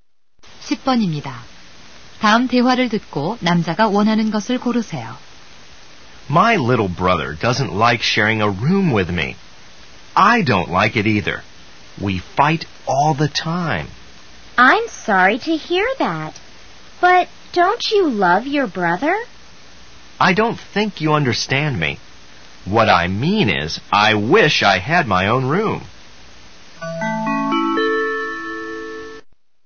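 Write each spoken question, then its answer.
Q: 다음 대화를 듣고 남자가 원하는 것을 고르세요.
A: 자기 방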